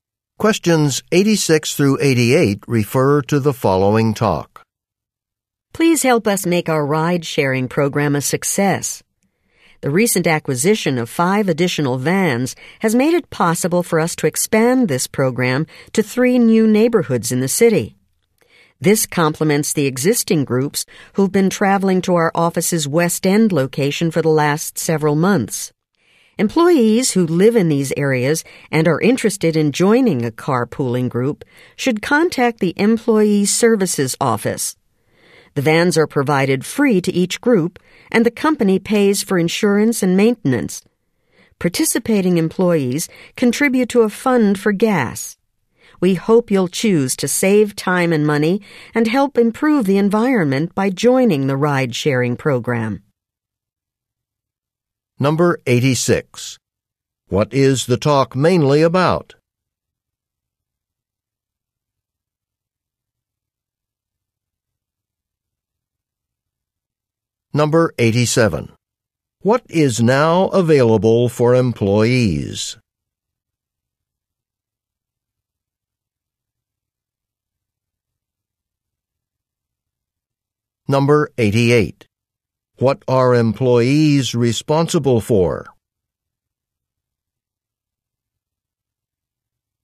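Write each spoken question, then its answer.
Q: What is the talk mainly about?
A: The ride-sharing program

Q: What is now available for employees?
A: Additional vans for carpooling in new neighborhoods

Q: What are employees responsible for?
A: Contributing to a fund for gas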